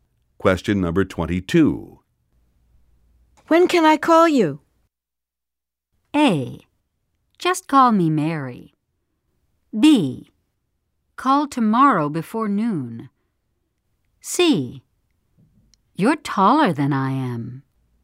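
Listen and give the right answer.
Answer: B: Call tomorrow before noon.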